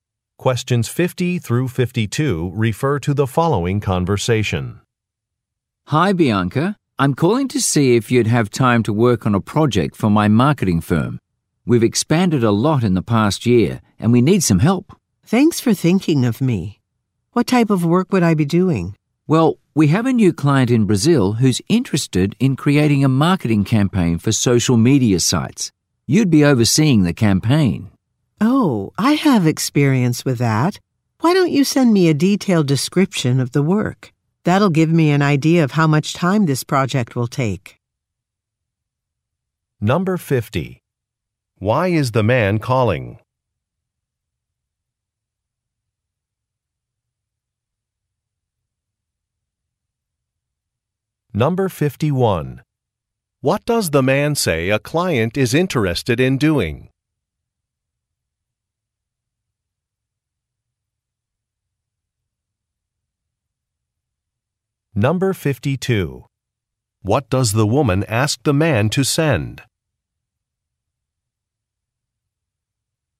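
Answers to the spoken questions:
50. To offer a project
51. Creating a social media marketing campaign
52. A detailed description of the work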